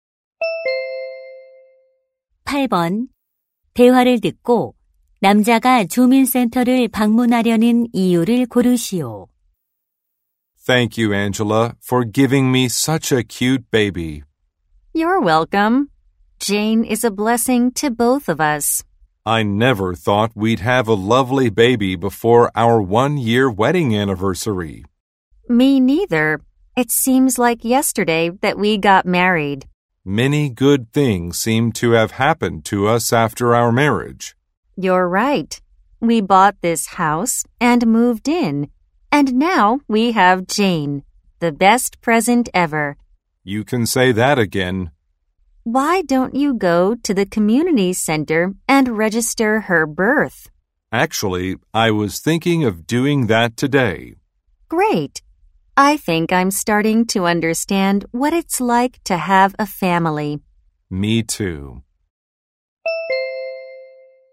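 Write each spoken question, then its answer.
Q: 남자가 주민센터를 방문하려는 이유를 고르시오.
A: 아기 출생 신고를 하려고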